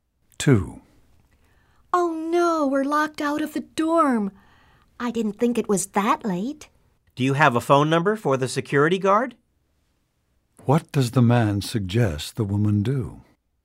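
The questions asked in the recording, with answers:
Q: What does the man suggest the woman do?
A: Call the security guard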